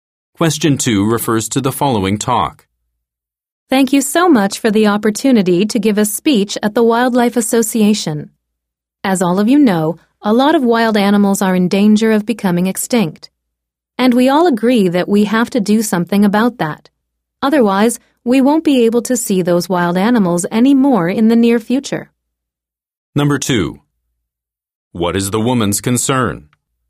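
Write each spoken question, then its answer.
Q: What is the woman's concern?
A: Many wild animals are in danger of becoming extinct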